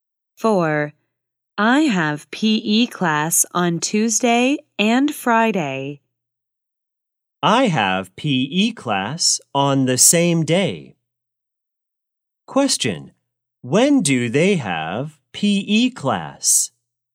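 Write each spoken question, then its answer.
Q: When do they have PE class?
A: On Tuesday and Friday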